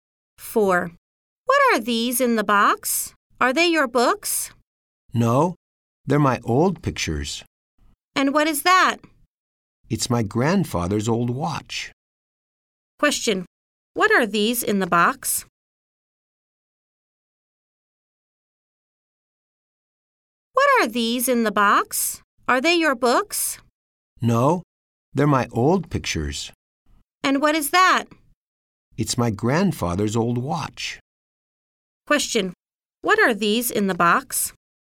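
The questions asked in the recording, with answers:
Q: What are these in the box?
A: They are old pictures.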